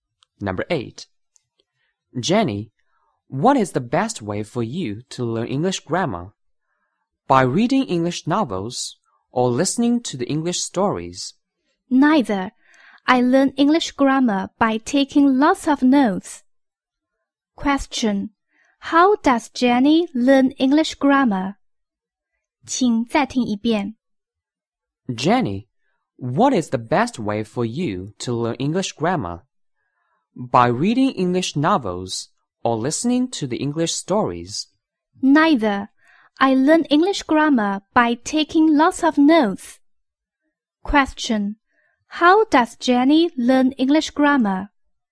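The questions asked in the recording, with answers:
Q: How does Jenny learn English grammar?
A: By taking lots of notes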